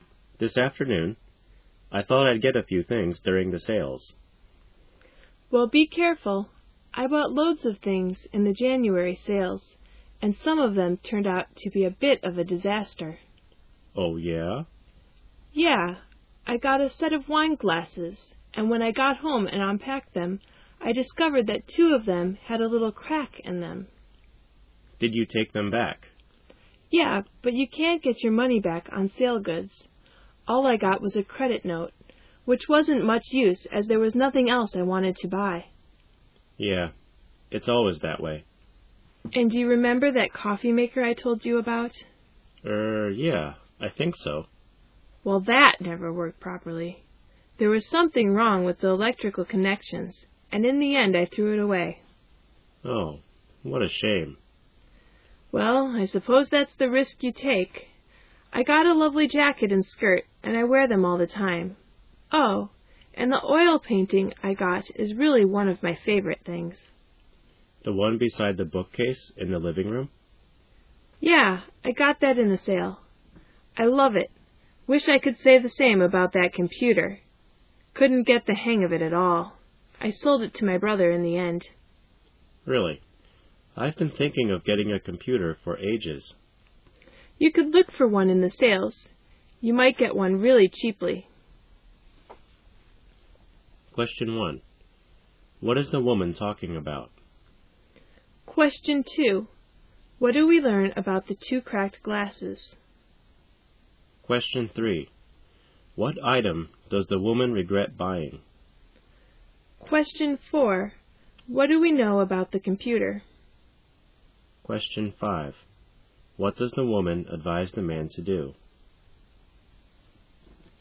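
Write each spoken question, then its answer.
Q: What is the woman talking about?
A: Things she bought in the January sales

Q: What do we learn about the two cracked glasses?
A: She took them back but only got a credit note

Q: What do we know about the computer?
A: She couldn't use it and sold it to her brother

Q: What does the woman advise the man to do?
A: Look for a computer in the sales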